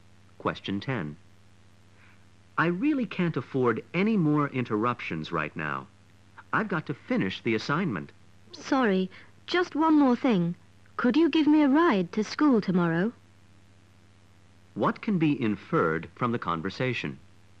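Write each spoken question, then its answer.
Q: What can be inferred from the conversation?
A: The first speaker is busy with an assignment and the other speaker keeps interrupting.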